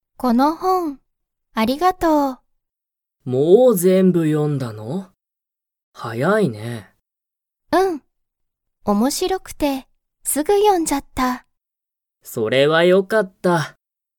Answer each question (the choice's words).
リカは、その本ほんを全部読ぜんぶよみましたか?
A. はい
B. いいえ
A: はい